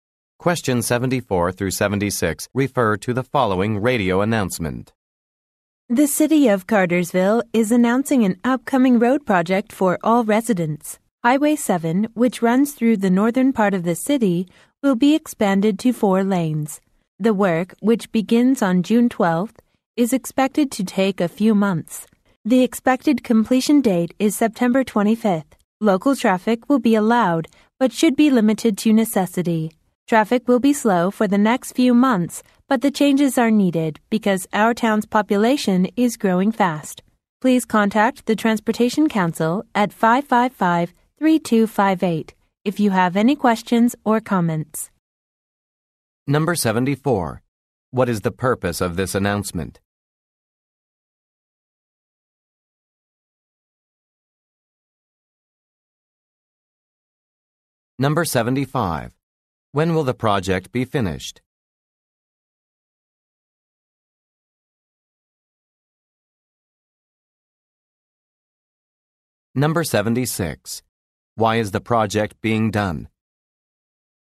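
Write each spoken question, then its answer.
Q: What is the purpose of this announcement?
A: To announce a road expansion project on Highway 7

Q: When will the project be finished?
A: September 25th

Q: Why is the project being done?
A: The town's population is growing fast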